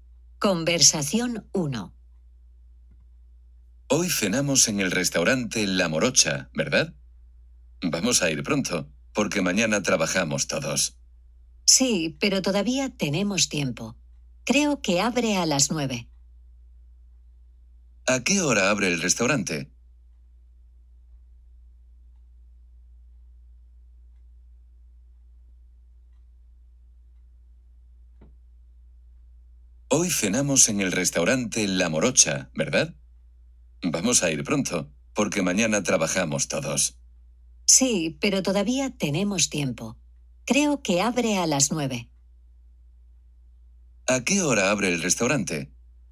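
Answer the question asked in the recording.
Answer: A las 9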